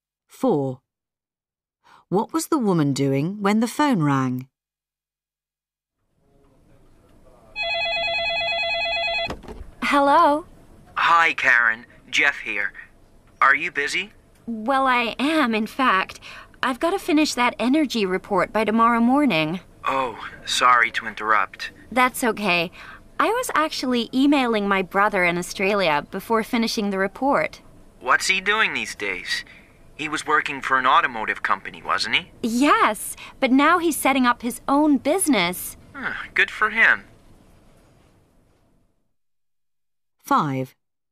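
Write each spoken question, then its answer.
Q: What was the woman doing when the phone rang?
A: Emailing her brother in Australia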